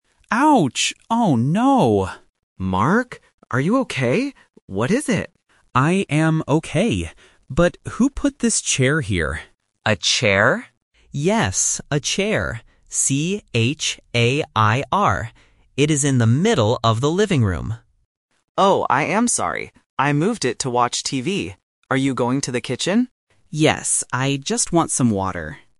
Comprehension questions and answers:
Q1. What did Mark hit in the dark?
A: A chair

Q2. Where is the object?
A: In the middle of the living room

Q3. How do you spell the object that Mark hit?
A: C-H-A-I-R

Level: A1